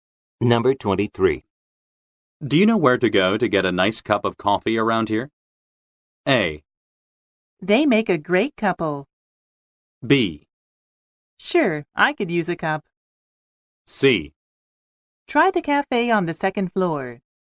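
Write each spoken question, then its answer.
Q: Do you know where to go to get a nice cup of coffee around here?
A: C: Try the cafe on the second floor.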